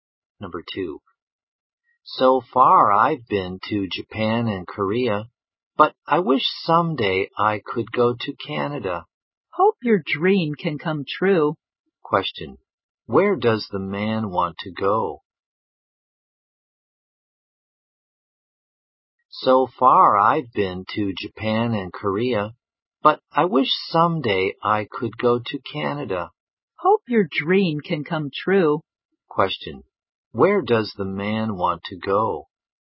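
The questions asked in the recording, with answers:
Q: Question. Where does the man want to go?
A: Canada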